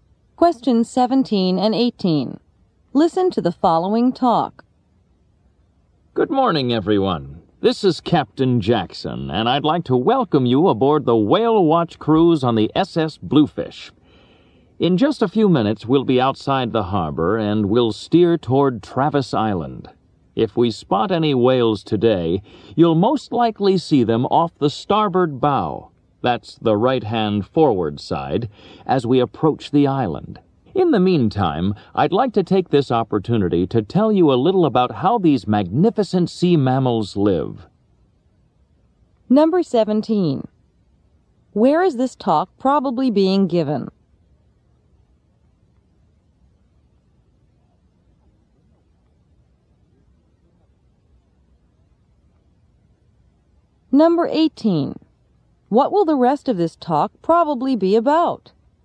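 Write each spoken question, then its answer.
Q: Where is this talk probably being given?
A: On a boat (whale watch cruise)

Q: What will the rest of this talk probably be about?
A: How whales live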